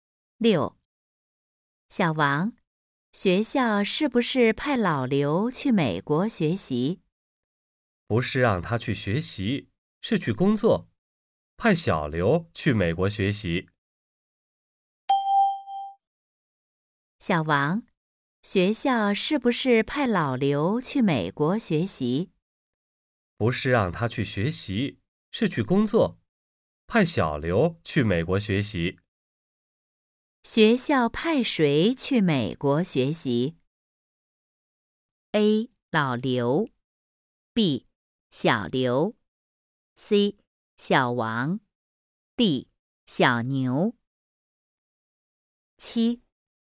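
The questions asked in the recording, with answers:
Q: 学校派谁去美国学习?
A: B: 小刘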